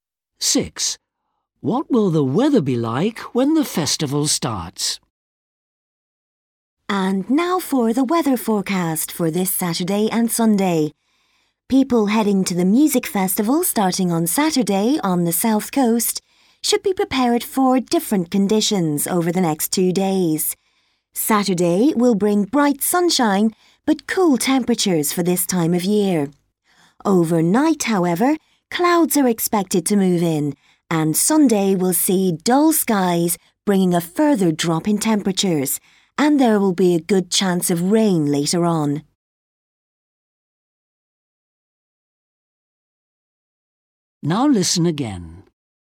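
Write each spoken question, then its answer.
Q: What will the weather be like when the festival starts?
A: bright sunshine but cool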